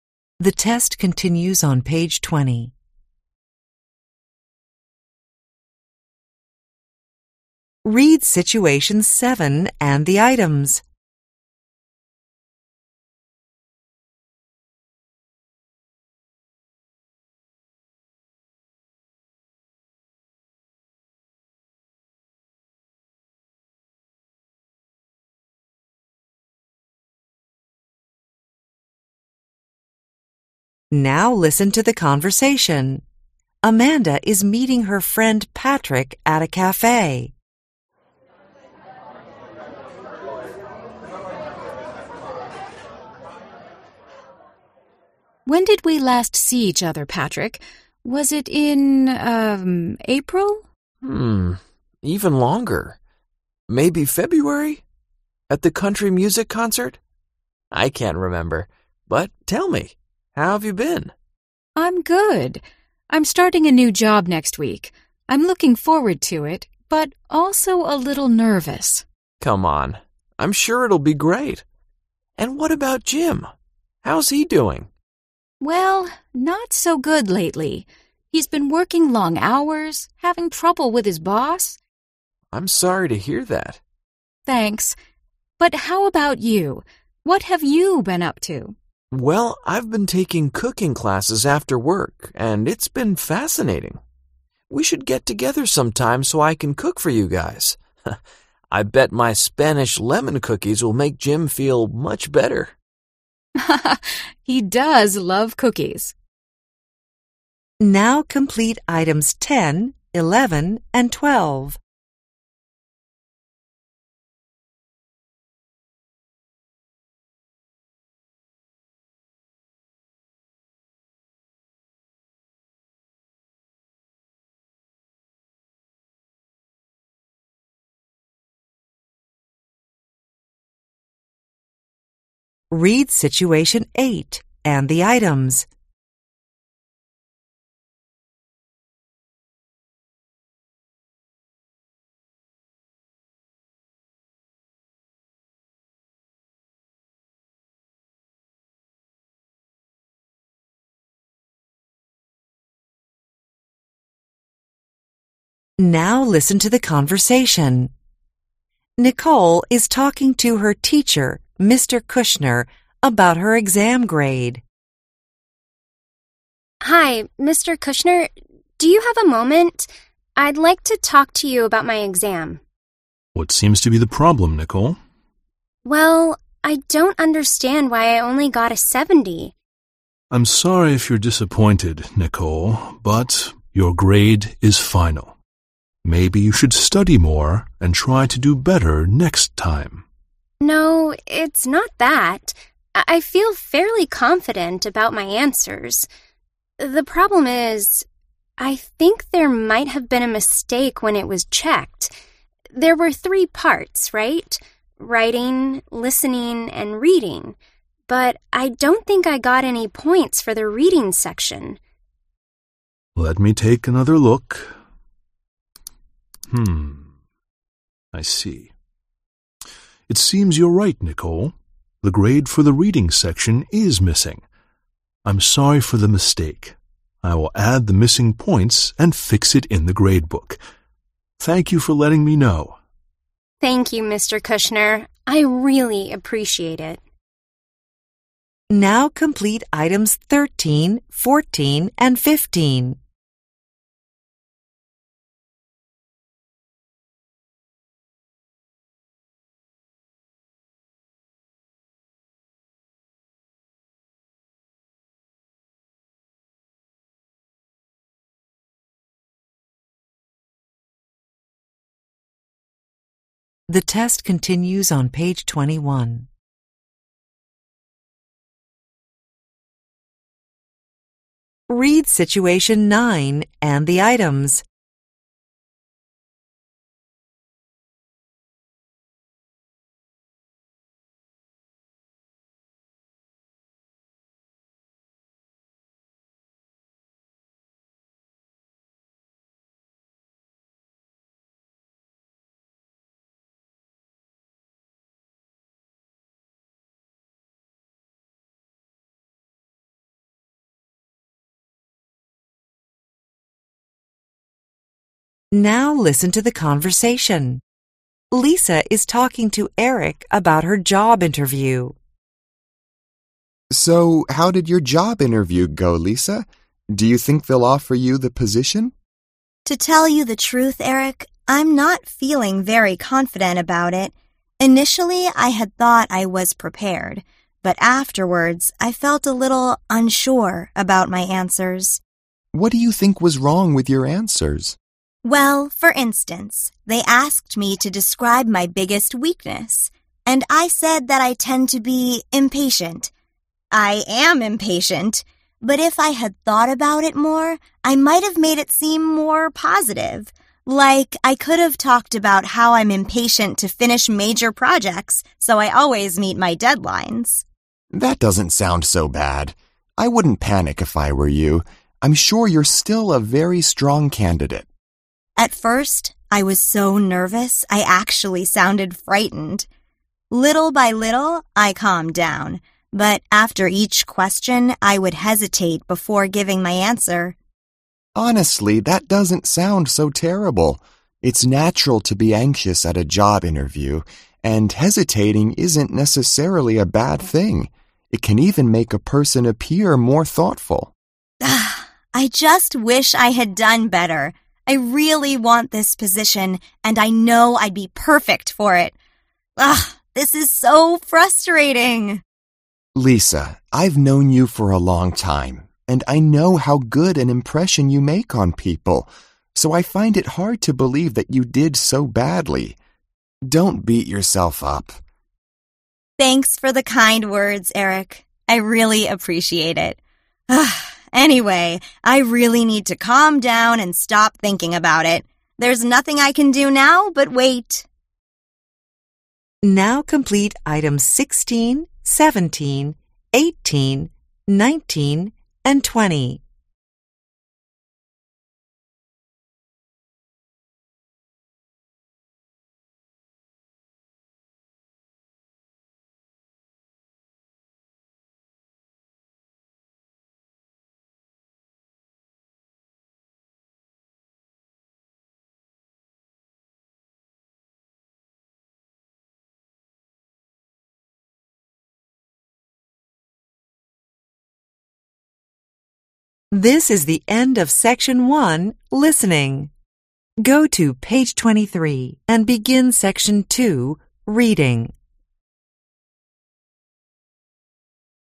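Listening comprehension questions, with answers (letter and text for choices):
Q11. Amanda .....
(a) has found a new job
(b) is looking for another job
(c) finds her work too challenging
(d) has been having problems at work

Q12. Patrick .....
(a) has been learning Spanish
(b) isn't enjoying his cooking class very much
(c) has been all over the world lately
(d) wants to cook for Amanda and Jim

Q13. Mr. Kushner .....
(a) thought that Nicole was disappointed with her grade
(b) doesn't think Nicole knows about his rules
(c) usually lets students take exams a second time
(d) thinks that Nicole will get a better grade next time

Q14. Nicole thinks that she got a low grade because .....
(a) she only had time to answer the reading questions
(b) she didn't get a grade on the reading section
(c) she forgot to answer the reading questions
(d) she did badly on the reading section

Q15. In the end, Mr. 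Kushner .....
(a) wasn't able to help Nicole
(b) asked Nicole not to miss an exam again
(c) apologized to Nicole for the problem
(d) realized that Nicole's exam was missing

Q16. After Lisa's interview, she felt .....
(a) more optimistic than she did before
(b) she was well prepared for it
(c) uncertain about it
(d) her answers sounded very confident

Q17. During the interview, Lisa .....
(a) recognized that she's an impatient person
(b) said she tended to be too positive about things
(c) admitted she didn't enjoy working on big projects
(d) boasted that she always met her deadlines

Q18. According to Eric, ......... can make a person seem intelligent.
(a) taking less time to answer a question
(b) staying calm throughout an interview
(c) speaking naturally and showing no anxiety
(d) pausing before saying something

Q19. Lisa .....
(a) thinks she could find a much better job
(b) usually believes in miracles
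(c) expects to be offered the position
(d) feels frustrated about the situation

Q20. Eric .....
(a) agrees with Lisa's views on her performance at the interview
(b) thinks people naturally have a good opinion about Lisa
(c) is concerned that Lisa might quit her job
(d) advises her not to be so proud of herself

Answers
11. (a) has found a new job
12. (d) wants to cook for Amanda and Jim
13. (a) thought that Nicole was disappointed with her grade
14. (b) she didn't get a grade on the reading section
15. (c) apologized to Nicole for the problem
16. (c) uncertain about it
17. (a) recognized that she's an impatient person
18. (d) pausing before saying something
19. (d) feels frustrated about the situation
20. (b) thinks people naturally have a good opinion about Lisa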